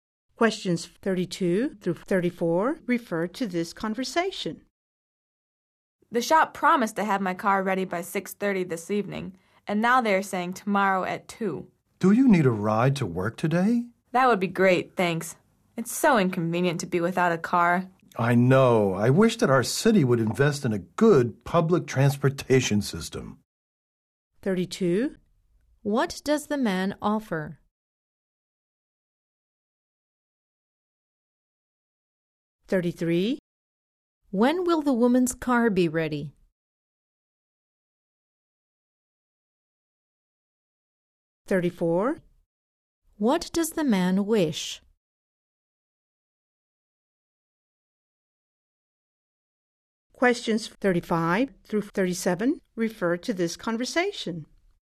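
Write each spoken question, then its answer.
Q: What does the man wish?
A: That the city would invest in good public transportation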